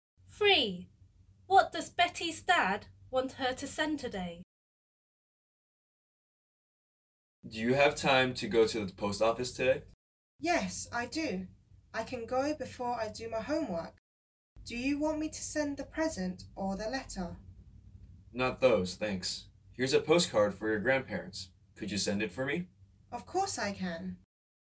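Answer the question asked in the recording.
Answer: a postcard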